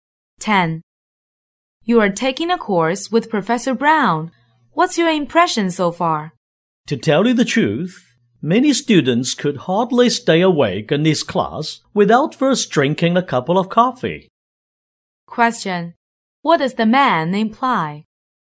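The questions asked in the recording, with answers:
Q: What does the man imply?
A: Professor Brown's class is boring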